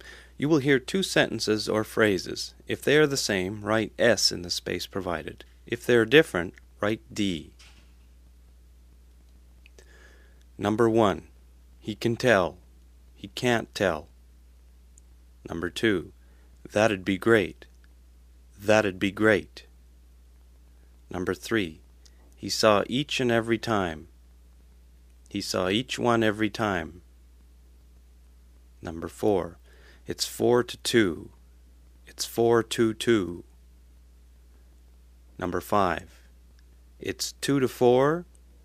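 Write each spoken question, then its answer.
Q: He can tell. He can't tell.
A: D (different)

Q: He saw each and every time. He saw each one every time.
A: D (different)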